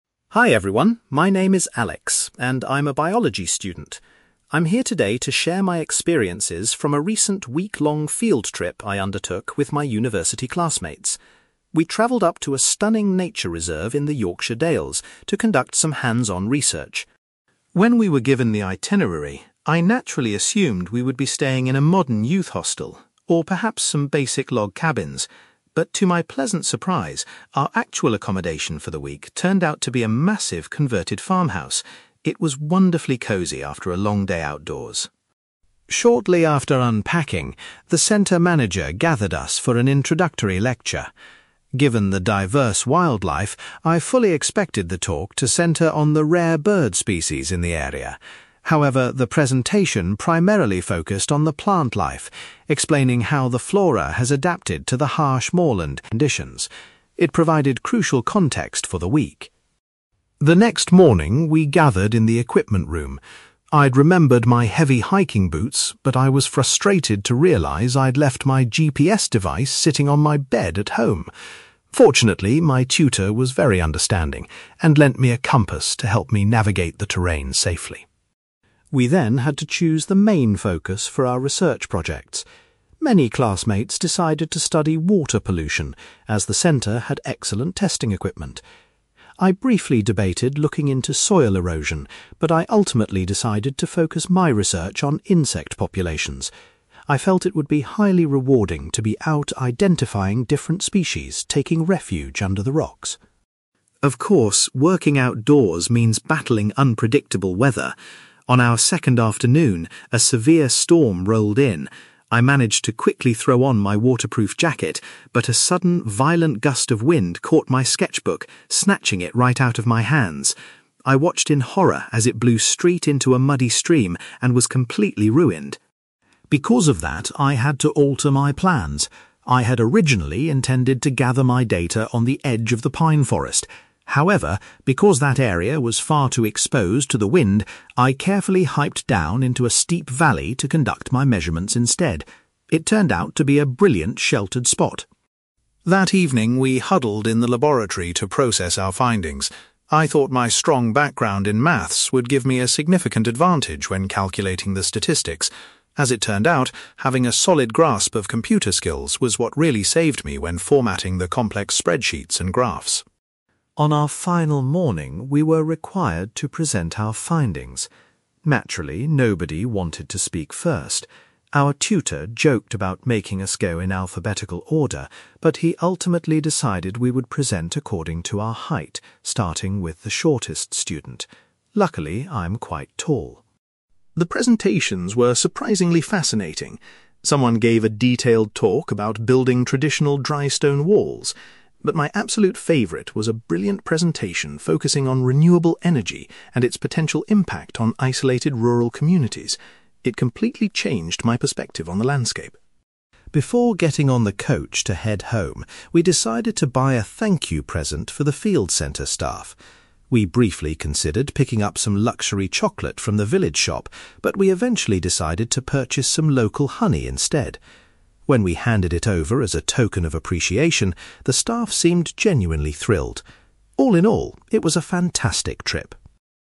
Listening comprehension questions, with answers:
You will hear a university student called Alex giving a presentation about a biology field trip to a rural study centre. For questions 9-18, complete the sentences with a word or short phrase.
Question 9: Alex was surprised that the group's accommodation was a (9)........................... rather than a youth hostel.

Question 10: The manager's introductory lecture was mainly focused on the (10)........................... found in the region.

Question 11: Alex was relieved when his tutor allowed him to borrow a (11)........................... for navigation.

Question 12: For his main research project, Alex chose to investigate the (12)........................... in the area.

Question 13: Alex was upset when a strong gust of wind blew his (13)........................... into the water.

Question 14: To avoid the harsh weather, Alex conducted his research in a (14)........................... .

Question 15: When processing data in the laboratory, Alex found his (15)........................... to be unexpectedly useful.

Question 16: The teacher decided that the students would give their presentations based on their (16)........................... .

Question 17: Alex was most impressed by a classmate's presentation about (17)........................... .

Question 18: The students bought some (18)........................... from a village shop to give to the staff.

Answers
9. converted farmhouse
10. plant life
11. compass
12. insect populations
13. sketchbook
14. steep valley
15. computer skills
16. height
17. renewable energy
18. local honey

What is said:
Alex: Hi everyone, my name is Alex, and I'm a biology student. I'm here today to share my experiences from a recent week-long field trip I undertook with my university classmates. We travelled up to a stunning nature reserve in the Yorkshire Dales to conduct some hands-on research.
When we were given the itinerary, I naturally assumed we would be staying in a modern youth hostel, or perhaps some basic log cabins. But to my pleasant surprise, our actual accommodation for the week turned out to be a massive converted farmhouse. It was wonderfully cosy after a long day outdoors.
Shortly after unpacking, the centre manager gathered us for an introductory lecture. Given the diverse wildlife, I fully expected the talk to centre on the rare bird species in the area. However, the presentation primarily focused on the plant life, explaining how the flora has adapted to the harsh moorland conditions. It provided crucial context for the week.
The next morning, we gathered in the equipment room. I'd remembered my heavy hiking boots, but I was frustrated to realise I'd left my GPS device sitting on my bed at home! Fortunately, my tutor was very understanding and lent me a compass to help me navigate the terrain safely.
We then had to choose the main focus for our research projects. Many classmates decided to study water pollution, as the centre had excellent testing equipment. I briefly debated looking into soil erosion, but I ultimately decided to focus my research on insect populations. I felt it would be highly rewarding to be out identifying different species taking refuge under the rocks.
Of course, working outdoors means battling unpredictable weather. On our second afternoon, a severe storm rolled in. I managed to quickly throw on my waterproof jacket, but a sudden, violent gust of wind caught my sketchbook, snatching it right out of my hands. I watched in horror as it blew straight into a muddy stream and was completely ruined!
Because of that, I had to alter my plans. I had originally intended to gather my data on the edge of the pine forest. However, because that area was far too exposed to the wind, I carefully hiked down into a steep valley to conduct my measurements instead. It turned out to be a brilliant, sheltered spot.
That evening, we huddled in the laboratory to process our findings. I thought my strong background in maths would give me a significant advantage when calculating the statistics. As it turned out, having a solid grasp of computer skills was what really saved me when formatting the complex spreadsheets and graphs.
On our final morning, we were required to present our findings. Naturally, nobody wanted to speak first. Our tutor joked about making us go in alphabetical order, but he ultimately decided we would present according to our height, starting with the shortest student. Luckily, I'm quite tall!
The presentations were surprisingly fascinating. Someone gave a detailed talk about building traditional dry-stone walls. But my absolute favourite was a brilliant presentation focusing on renewable energy and its potential impact on isolated rural communities. It completely changed my perspective on the landscape.
Before getting on the coach to head home, we decided to buy a thank-you present for the field centre staff. We briefly considered picking up some luxury chocolate from the village shop, but we eventually decided to purchase some local honey instead. When we handed it over as a token of appreciation, the staff seemed genuinely thrilled. All in all, it was a fantastic trip.

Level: B2